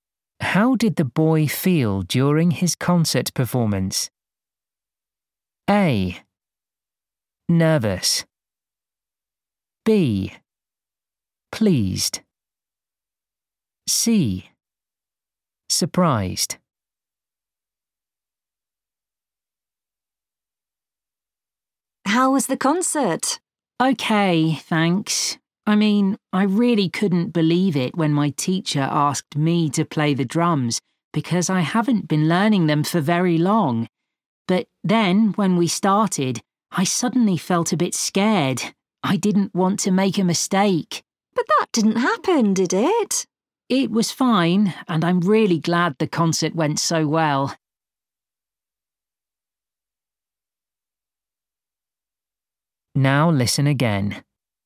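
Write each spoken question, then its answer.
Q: How did the boy feel during his concert performance?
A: A: Nervous.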